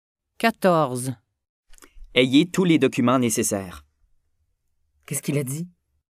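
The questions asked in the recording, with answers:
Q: Qu'est-ce qu'il a dit?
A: Il a dit d'avoir tous les documents nécessaires.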